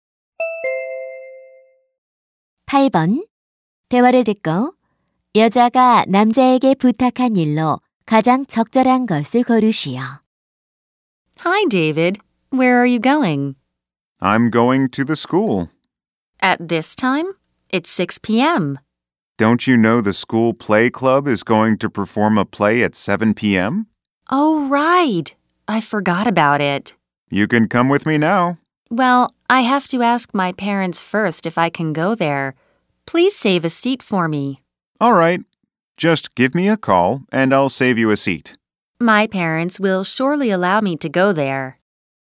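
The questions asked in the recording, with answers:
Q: 대화를 듣고 여자가 남자에게 부탁한 일로 가장 적절한 것을 고르시오.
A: 자리를 맡아 달라는 것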